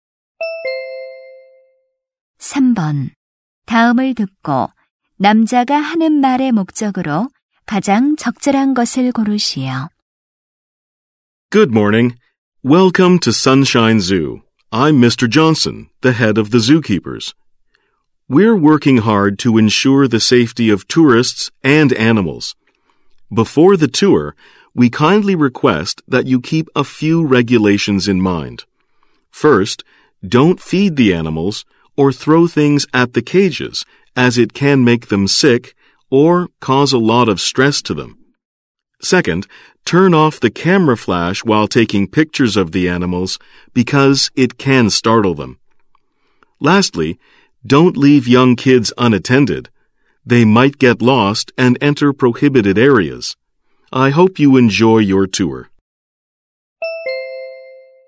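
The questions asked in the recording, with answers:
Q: 다음을 듣고 남자가 하는 말의 목적으로 가장 적절한 것을 고르시오.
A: 동물원 관람 시 지켜야 할 규칙을 안내하려고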